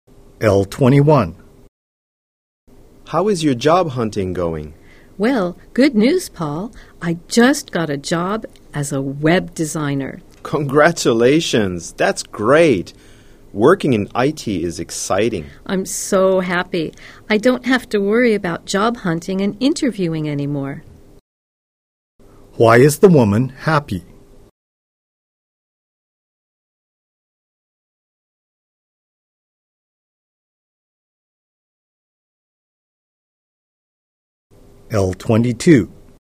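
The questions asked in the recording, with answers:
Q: Why is the woman happy?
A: She got a job as a web designer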